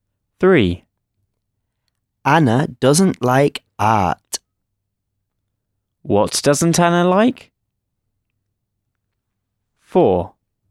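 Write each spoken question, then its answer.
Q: What doesn't Anna like?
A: art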